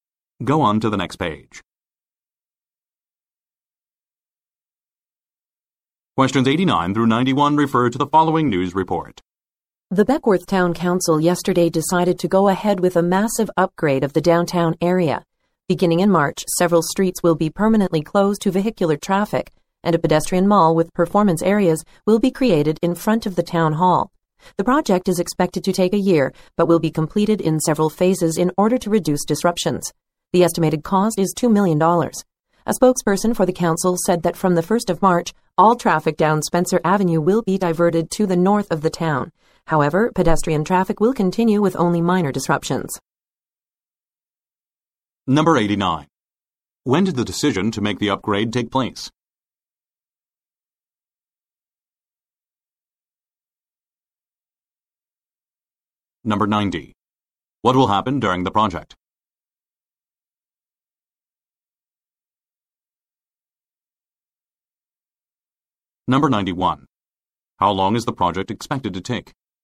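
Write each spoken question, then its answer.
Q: When did the decision to make the upgrade take place?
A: Yesterday

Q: How long is the project expected to take?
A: A year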